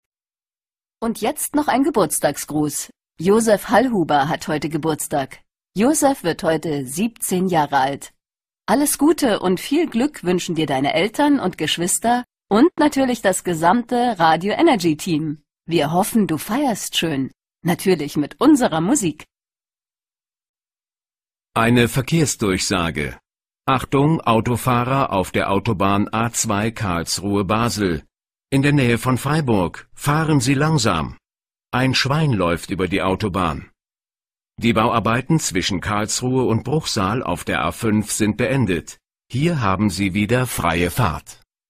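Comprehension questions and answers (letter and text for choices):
Klicken Sie auf die Wiedergabetaste, hören Sie sich das Audio sorgfältig an und beantworten Sie die Fragen 4 und 5.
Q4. Wer gratuliert zum Geburtstag?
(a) Josef, ein junger Mann.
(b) Josefs Kollege aus dem Radio.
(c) Josefs Familie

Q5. Wer oder was läuft auf der Straße?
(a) Ein Autofahrer.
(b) Ein Straßenarbeiter.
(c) Ein Tier.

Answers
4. (c) Josefs Familie
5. (c) Ein Tier.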